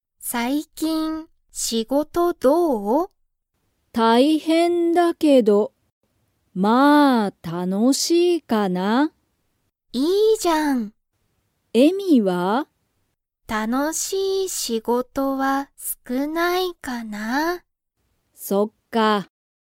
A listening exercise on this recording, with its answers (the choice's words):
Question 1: ユカは仕事(しごと)が、まあ____。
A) 最近(さいきん)だ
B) 少(すく)ない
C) 大変(たいへん)じゃない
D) 楽(たの)しい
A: 楽(たの)しい

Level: Level 1